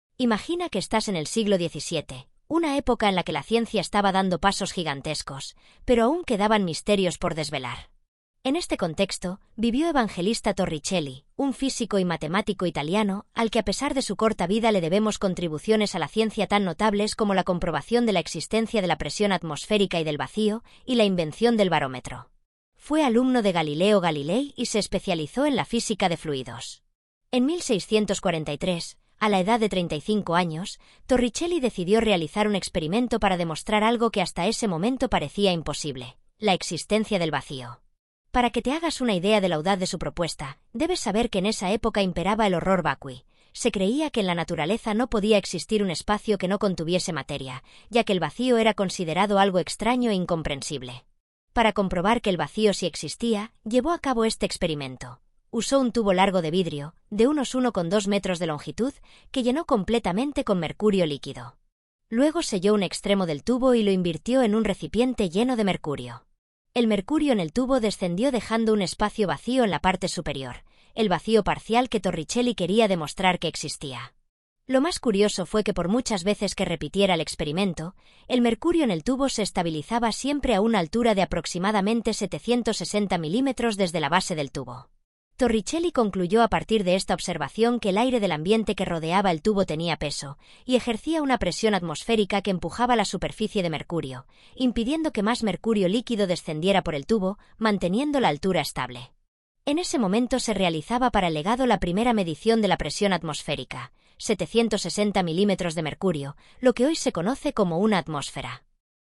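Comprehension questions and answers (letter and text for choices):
Después de leer atentamente el texto acerca del experimento de Torricelli, responde estas preguntas.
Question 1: Torricelli descubrió...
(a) La existencia de la atmósfera.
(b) La existencia del vacío.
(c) La existencia del barómetro.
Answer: (b) La existencia del vacío.

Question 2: El horror vacui era una creencia...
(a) Extraña e incomprensible.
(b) Innovadora en la época.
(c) Que Torricelli quiso desmentir.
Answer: (c) Que Torricelli quiso desmentir.

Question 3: Al invertir el tubo de mercurio sobre un recipiente que ya contenía mercurio...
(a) La altura de mercurio dentro del tubo descendió.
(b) El tubo se vació por completo dentro del recipiente.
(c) La presión atmosférica que actuaba sobre el recipiente impidió que la altura de mercurio del tubo variase.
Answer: (a) La altura de mercurio dentro del tubo descendió.

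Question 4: La parte superior del tubo, tras el experimento, contenía...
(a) Aire.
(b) Mercurio.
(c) Nada.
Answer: (c) Nada.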